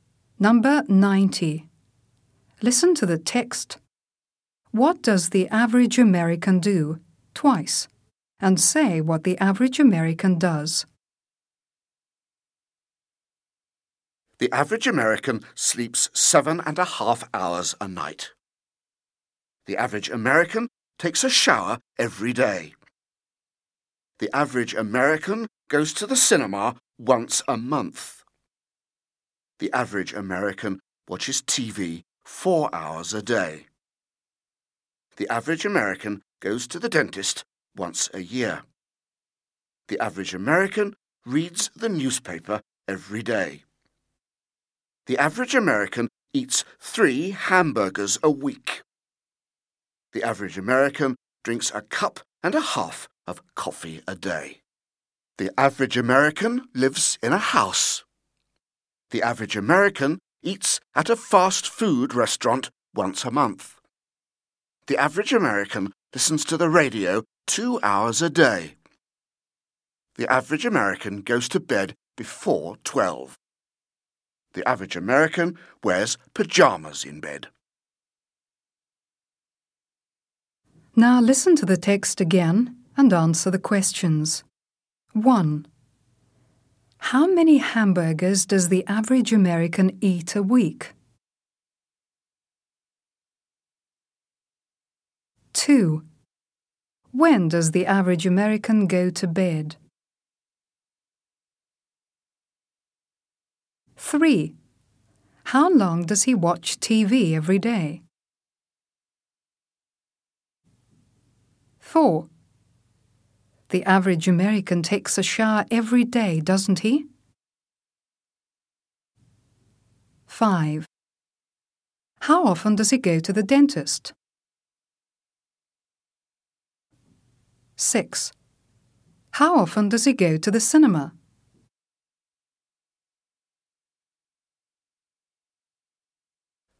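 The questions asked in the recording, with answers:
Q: How many hamburgers does the average American eat a week?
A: 3 hamburgers

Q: When does the average American go to bed?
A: Before 12

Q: How long does he watch TV every day?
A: 4 hours a day

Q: The average American takes a shower every day, doesn't he?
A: Yes, he does

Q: How often does he go to the dentist?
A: Once a year

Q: How often does he go to the cinema?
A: Once a month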